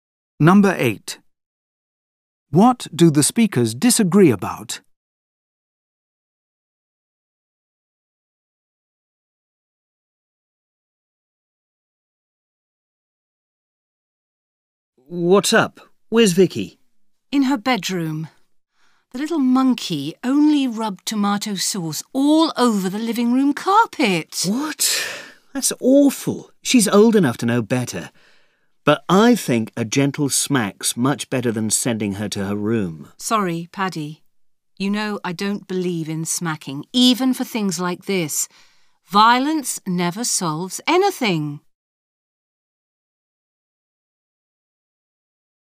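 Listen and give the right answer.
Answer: How to punish their child (smacking or sending her to her room)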